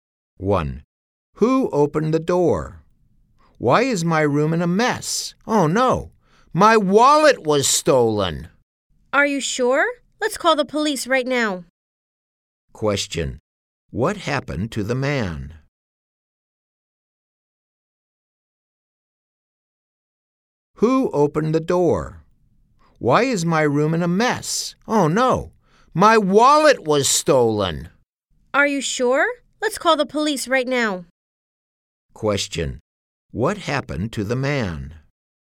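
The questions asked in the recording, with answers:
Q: Question, what happened to the man?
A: His wallet was stolen.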